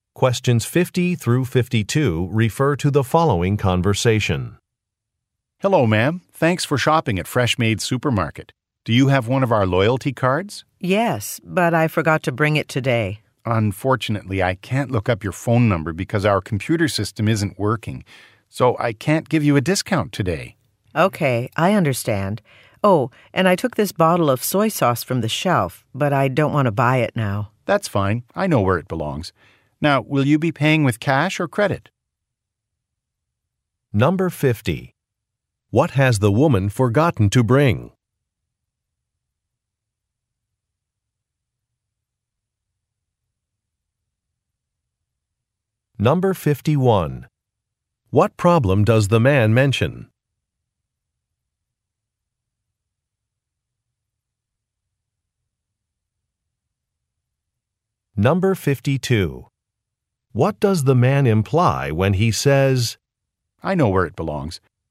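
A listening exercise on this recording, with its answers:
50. What has the woman forgotten to bring?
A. A receipt for an item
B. A loyalty card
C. Some coupons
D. Some shopping bags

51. What problem does the man mention?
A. A manager is not available.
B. A product is out of stock.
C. A computer system is not working.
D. An advertised price is incorrect.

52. What does the man imply when he says, "I know where it belongs"?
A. He can tell the woman where to find an item.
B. He will return an item to the correct location.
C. A supervisor is not available.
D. An item has been put on the wrong shelf.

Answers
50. B. A loyalty card
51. C. A computer system is not working.
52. B. He will return an item to the correct location.

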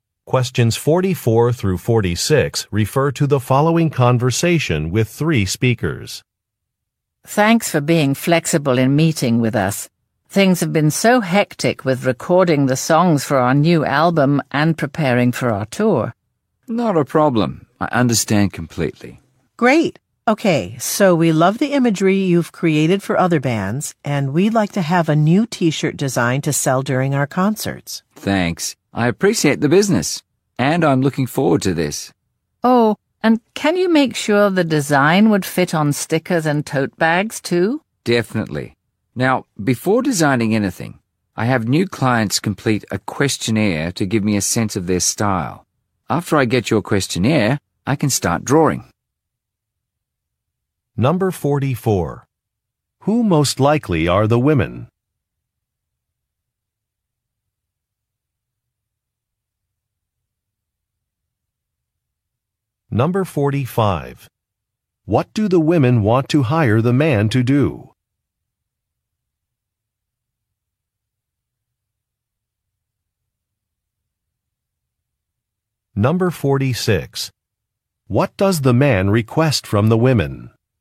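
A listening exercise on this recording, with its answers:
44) Who most likely are the women?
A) Athletes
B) Musicians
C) Radio announcers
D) Clothing manufacturers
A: B) Musicians

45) What do the women want to hire the man to do?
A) Design some merchandise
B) Repair some equipment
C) Plan some events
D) Move some furniture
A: A) Design some merchandise

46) What does the man request from the women?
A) A reimbursement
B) An official certificate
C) A contract signature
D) A completed questionnaire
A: D) A completed questionnaire

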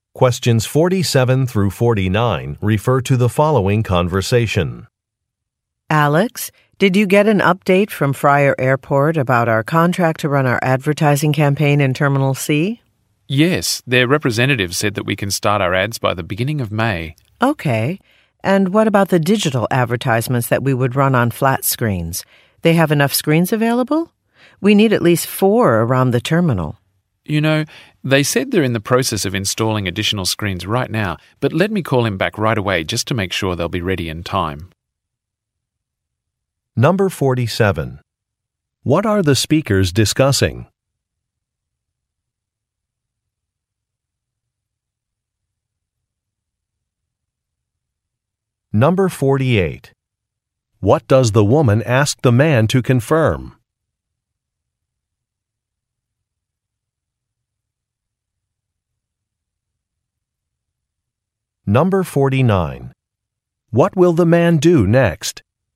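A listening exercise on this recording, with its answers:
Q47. What are the speakers discussing?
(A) Plans for an advertising campaign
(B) A delay in a construction project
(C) Arranging a business trip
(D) Hosting a company party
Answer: (A) Plans for an advertising campaign

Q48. What does the woman ask the man to confirm?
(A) The weight of some material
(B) The availability of some equipment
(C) The cost of a service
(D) The number of attendees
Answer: (B) The availability of some equipment

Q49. What will the man do next?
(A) Review an invoice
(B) Design an invitation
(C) Make a phone call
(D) Inspect a space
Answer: (C) Make a phone call

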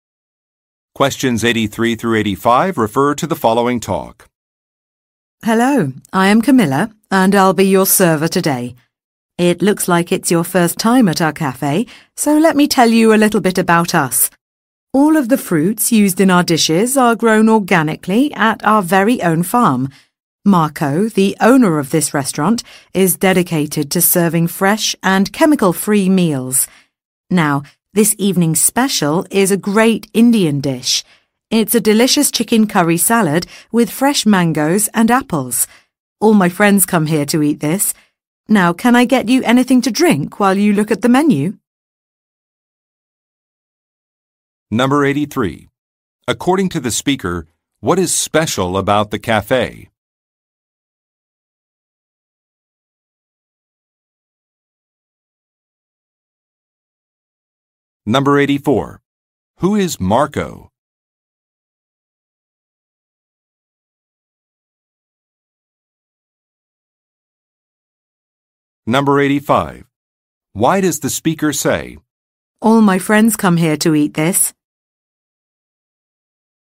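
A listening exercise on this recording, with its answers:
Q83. According to the speaker, what is special about the café?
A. It operates a farm.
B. It has a remodeled kitchen.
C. It provides a cooking course.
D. It employs an Indian chef.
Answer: A. It operates a farm.

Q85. Why does the speaker say, "All my friends come here to eat this"?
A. He recommends a menu item.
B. He knows that a restaurant is popular.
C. He would like to try a new dish.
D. He knows how to prepare a dish.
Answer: A. He recommends a menu item.

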